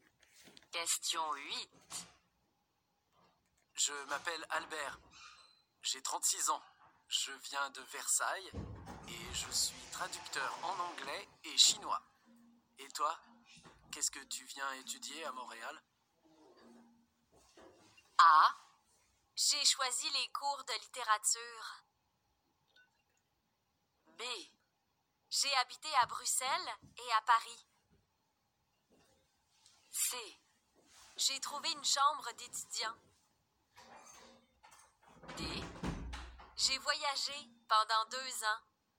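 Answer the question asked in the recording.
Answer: A: J'ai choisi les cours de littérature.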